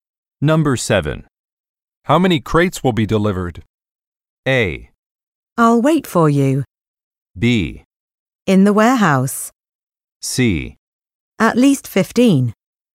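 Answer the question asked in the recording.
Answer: C: At least 15.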